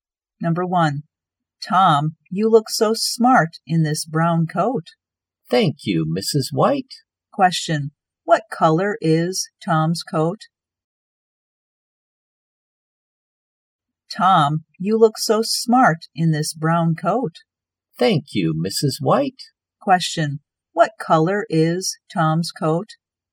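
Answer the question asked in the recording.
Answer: Brown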